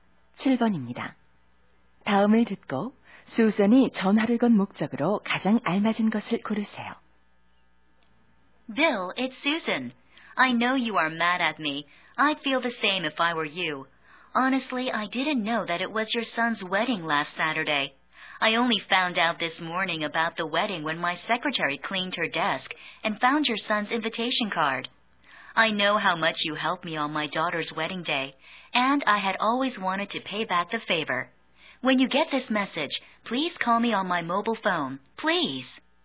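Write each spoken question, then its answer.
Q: 다음을 듣고 수선이 전화를 건 목적으로 가장 알맞은 것을 고르세요.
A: 아들 결혼식에 가지 못한 것을 사과하려고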